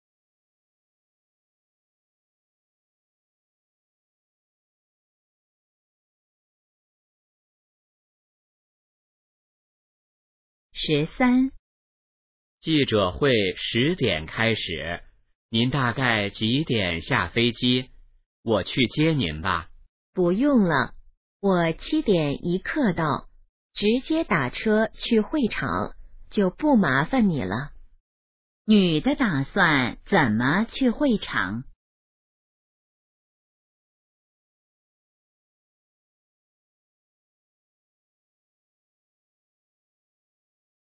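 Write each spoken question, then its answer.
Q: 女的打算怎么去会场?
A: 打车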